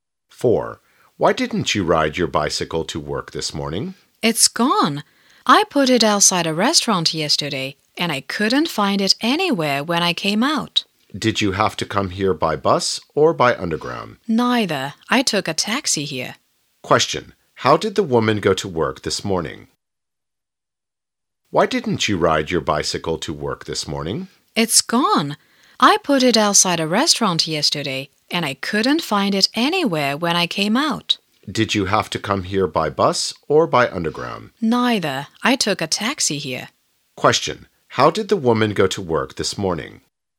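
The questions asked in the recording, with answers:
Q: How did the woman go to work this morning?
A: By taxi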